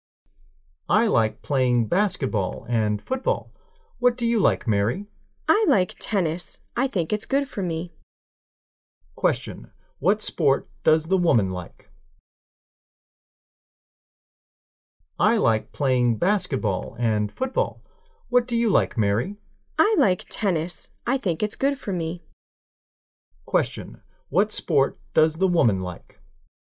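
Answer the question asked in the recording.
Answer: Tennis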